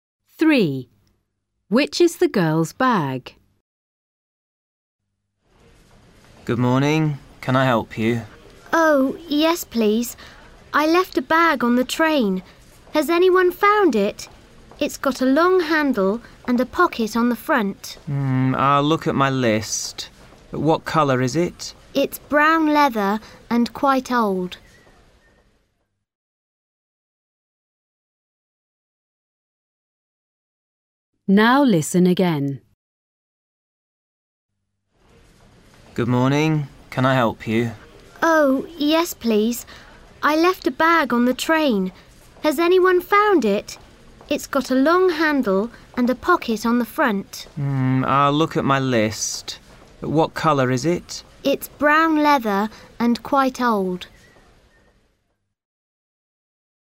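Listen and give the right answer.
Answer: an old brown leather bag with a long handle and a front pocket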